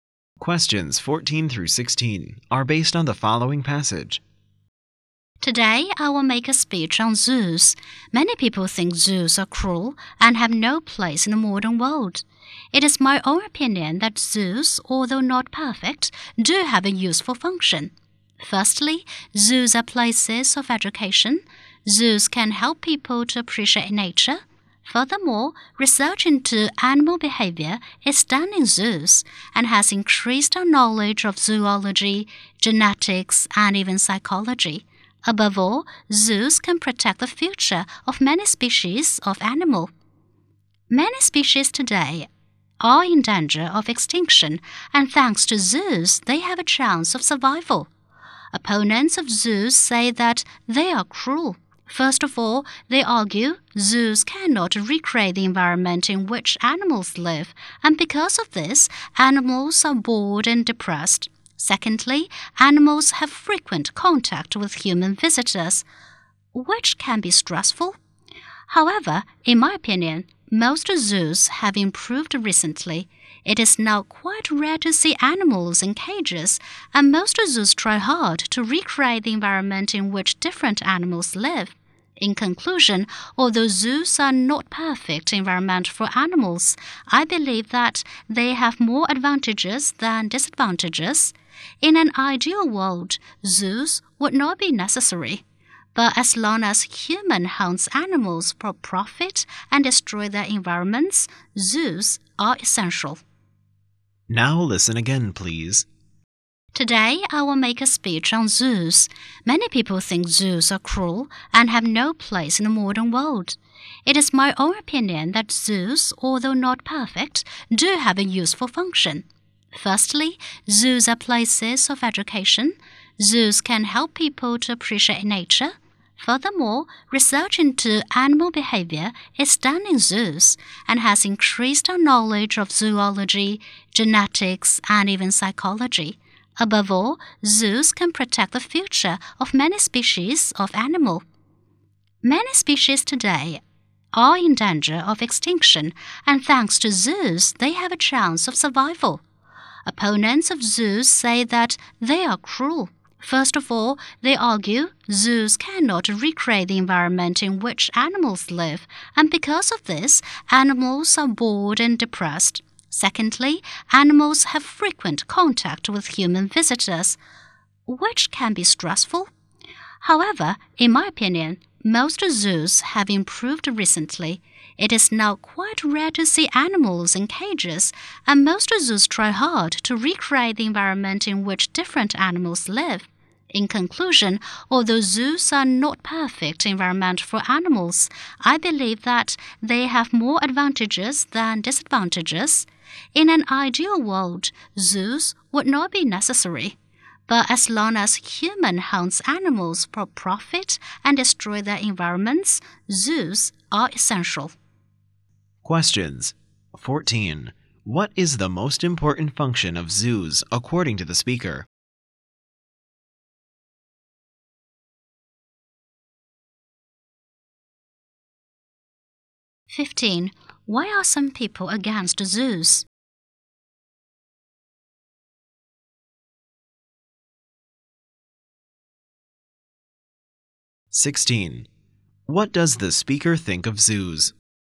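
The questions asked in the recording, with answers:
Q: What is the most important function of zoos according to the speaker?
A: Protecting endangered species from extinction

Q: Why are some people against zoos?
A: They think zoos are cruel: zoos can't recreate animals' environment and visitors stress them

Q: What does the speaker think of zoos?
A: They have more advantages than disadvantages and are essential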